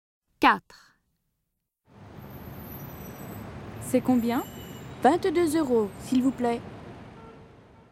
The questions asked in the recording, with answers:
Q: C'est combien?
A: 22 euros.